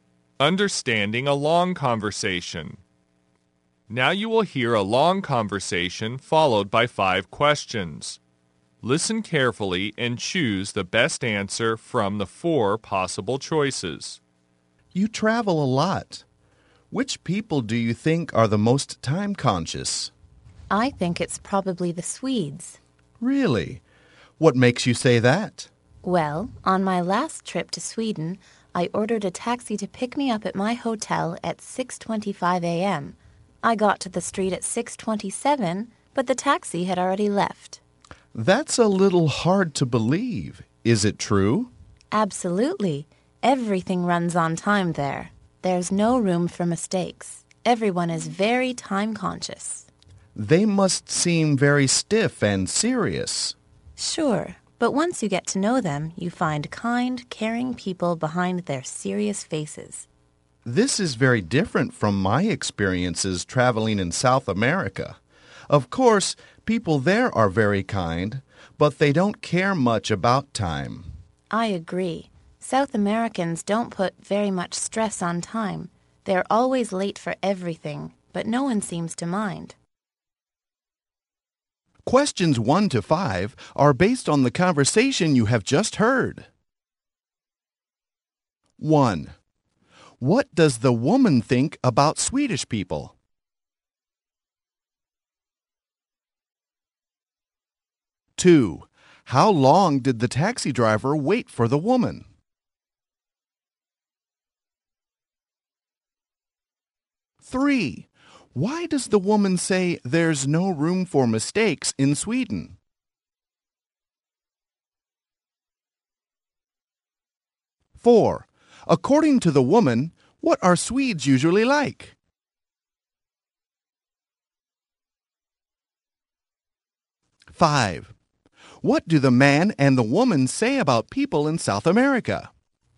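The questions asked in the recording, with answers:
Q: What does the woman think about Swedish people?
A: They are the most time conscious

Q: How long did the taxi driver wait for the woman?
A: Less than 2 minutes

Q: Why does the woman say there's no room for mistakes in Sweden?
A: Everything runs on time there

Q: According to the woman, what are Swedes usually like?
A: Serious on the outside but kind and caring

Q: What do the man and the woman say about people in South America?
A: They are kind but don't care much about time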